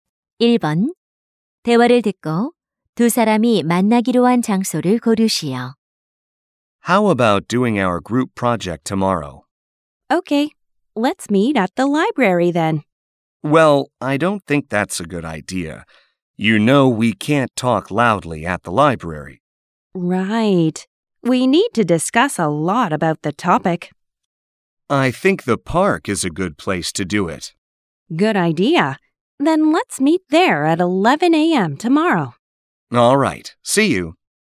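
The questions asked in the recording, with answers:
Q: 대화를 듣고 두 사람이 만나기로 한 장소를 고르시오.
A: 공원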